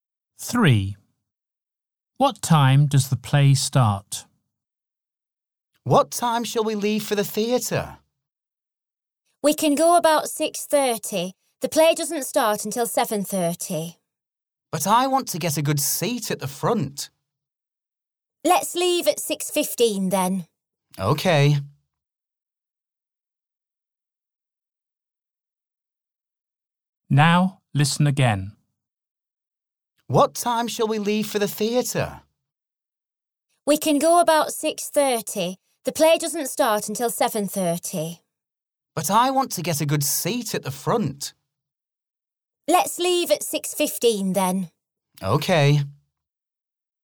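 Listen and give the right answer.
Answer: 7:30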